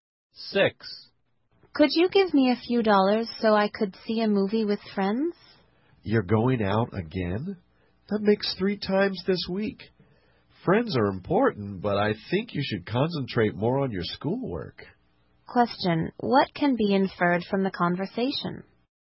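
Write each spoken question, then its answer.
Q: What can be inferred from the conversation?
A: The speaker thinks the other person should focus more on schoolwork than going out with friends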